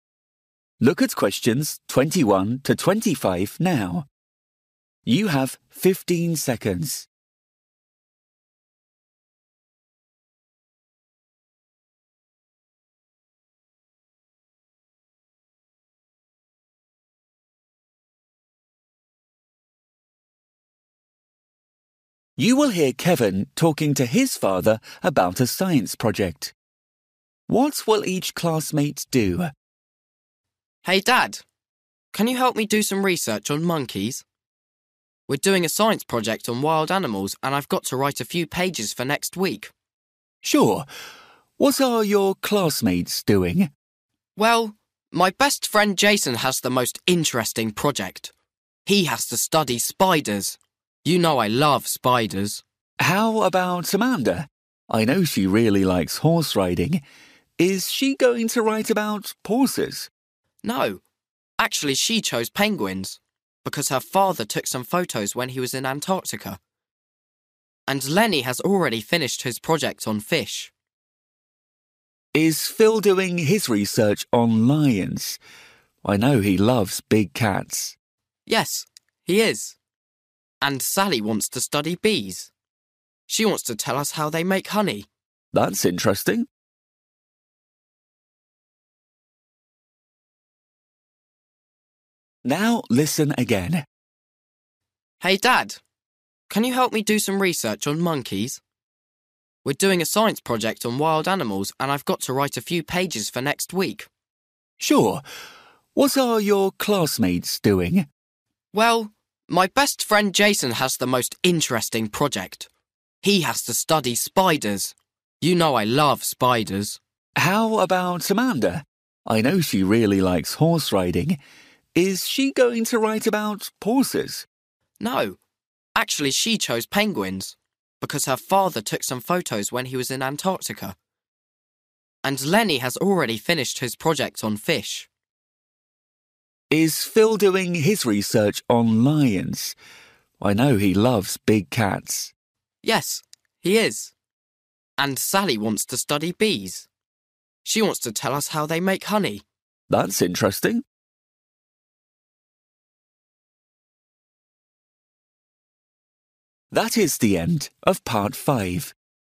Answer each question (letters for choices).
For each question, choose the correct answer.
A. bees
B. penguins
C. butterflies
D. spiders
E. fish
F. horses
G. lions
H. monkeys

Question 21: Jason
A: D

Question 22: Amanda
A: B

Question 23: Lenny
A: E

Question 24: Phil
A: G

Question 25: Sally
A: A

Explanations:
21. Well, my best friend Jason has the most interesting project: he has to study spiders. You know I love spiders.
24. Is Phil doing his research on lions? I know he loves big cats.
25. And Sally wants to study bees: she wants to tell us how they make honey.

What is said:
Kevin: Hey Dad, can you help me do some research on monkeys? We're doing a science project on wild animals and I've got to write a few pages for next week.
Dad: Sure. What are your classmates doing?
Kevin: Well, my best friend Jason has the most interesting project: he has to study spiders. You know I love spiders.
Dad: How about Amanda? I know she really likes horse riding. Is she going to write about horses?
Kevin: No, actually she chose penguins because her father took some photos when he was in Antactica. And Lenny has already finished his project on fish.
Dad: Is Phil doing his research on lions? I know he loves big cats.
Kevin: Yes, he is. And Sally wants to study bees: she wants to tell us how they make honey.
Dad: That's interesting!

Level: KET (A2)